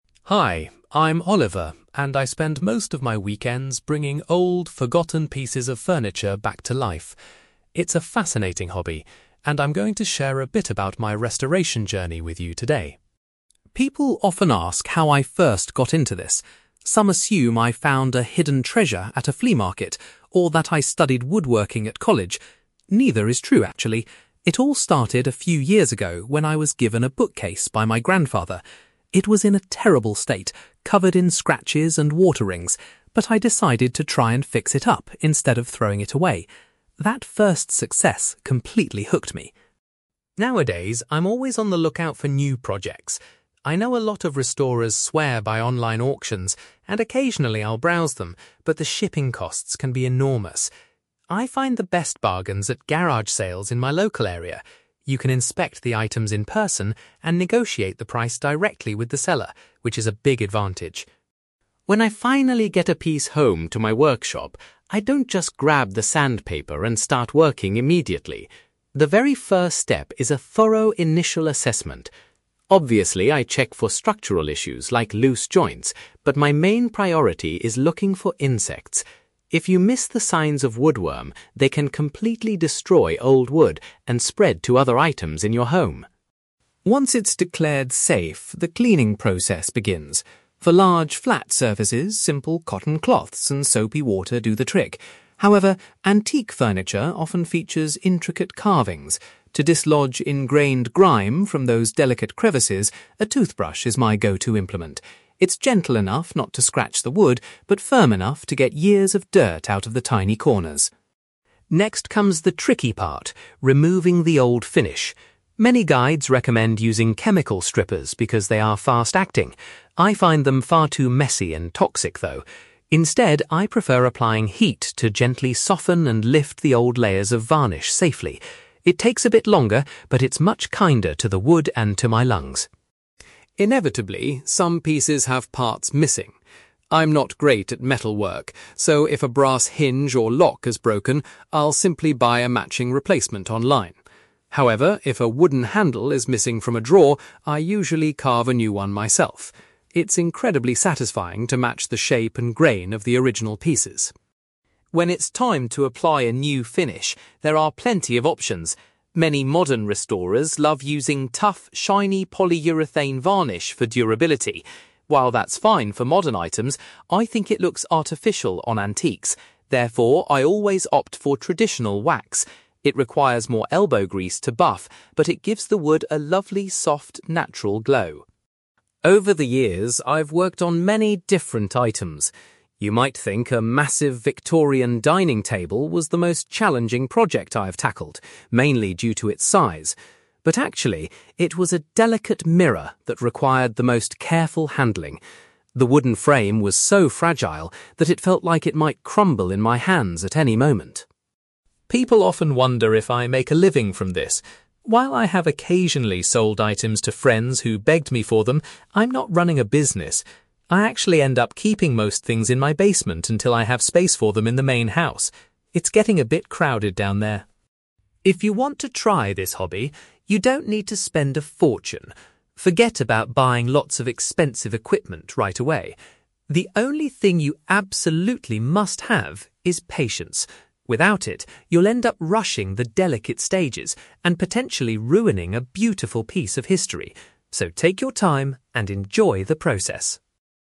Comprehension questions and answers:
You will hear a young man called Oliver talking about his hobby of restoring antique furniture. For questions 9-18, complete the sentences with a word or short phrase.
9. Oliver first became interested in restoration after receiving a (9)........................... from a relative.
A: bookcase

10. Oliver usually finds the cheapest items to restore at (10)........................... near his home.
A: garage sales

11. Before starting work, Oliver examines the wood closely to ensure there are no (11)........................... present.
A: insects

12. Oliver finds that a (12)........................... is the most effective tool for cleaning deeply ingrained dirt from carved areas.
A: toothbrush

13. Oliver prefers to use (13)........................... rather than chemicals to take off the original finish.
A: heat

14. If a piece of furniture is missing a (14)..........................., Oliver will carve a new one himself.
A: handle

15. Oliver applies (15)........................... to the restored furniture to give it a soft, natural shine.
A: wax

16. Oliver says that restoring an old (16)........................... was his most difficult project to date.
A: mirror

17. Currently, Oliver stores the majority of his completed projects in his (17)........................... .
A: basement

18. Oliver believes that having (18)........................... is the most essential requirement for anyone wanting to restore furniture.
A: patience

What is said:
Oliver: Hi, I'm Oliver, and I spend most of my weekends bringing old, forgotten pieces of furniture back to life. It's a fascinating hobby, and I'm going to share a bit about my restoration journey with you today.
People often ask how I first got into this. Some assume I found a hidden treasure at a flea market, or that I studied woodworking at college. Neither is true, actually. It all started a few years ago when I was given a bookcase by my grandfather. It was in a terrible state, covered in scratches and water rings, but I decided to try and fix it up instead of throwing it away. That first success completely hooked me.
Nowadays, I'm always on the lookout for new projects. I know a lot of restorers swear by online auctions, and occasionally I'll browse them, but the shipping costs can be enormous. I find the best bargains at garage sales in my local area. You can inspect the items in person and negotiate the price directly with the seller, which is a big advantage.
When I finally get a piece home to my workshop, I don't just grab the sandpaper and start working immediately. The very first step is a thorough initial assessment. Obviously, I check for structural issues like loose joints, but my main priority is looking for insects. If you miss the signs of woodworm, they can completely destroy old wood and spread to other items in your home.
Once it's declared safe, the cleaning process begins. For large, flat surfaces, simple cotton cloths and soapy water do the trick. However, antique furniture often features intricate carvings. To dislodge ingrained grime from those delicate crevices, a toothbrush is my go-to implement. It's gentle enough not to scratch the wood but firm enough to get years of dirt out of the tiny corners.
Next comes the tricky part: removing the old finish. Many guides recommend using chemical strippers because they are fast-acting. I find them far too messy and toxic, though. Instead, I prefer applying heat to gently soften and lift the old layers of varnish safely. It takes a bit longer, but it's much kinder to the wood and to my lungs!
Inevitably, some pieces have parts missing. I'm not great at metalwork, so if a brass hinge or lock is broken, I'll simply buy a matching replacement online. However, if a wooden handle is missing from a drawer, I usually carve a new one myself. It's incredibly satisfying to match the shape and grain of the original pieces.
When it's time to apply a new finish, there are plenty of options. Many modern restorers love using tough, shiny polyurethane varnish for durability. While that's fine for modern items, I think it looks artificial on antiques. Therefore, I always opt for traditional wax. It requires more elbow grease to buff, but it gives the wood a lovely soft, natural glow.
Over the years, I've worked on many different items. You might think a massive Victorian dining table was the most challenging project I've tackled, mainly due to its size. But actually, it was a delicate mirror that required the most careful handling. The wooden frame was so fragile that it felt like it might crumble in my hands at any moment.
People often wonder if I make a living from this. While I have occasionally sold items to friends who begged me for them, I'm not running a business. I actually end up keeping most things in my basement until I have space for them in the main house. It's getting a bit crowded down there!
If you want to try this hobby, you don't need to spend a fortune. Forget about buying lots of expensive equipment right away. The only thing you absolutely must have is patience. Without it, you'll end up rushing the delicate stages and potentially ruining a beautiful piece of history. So take your time, and enjoy the process!

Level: B2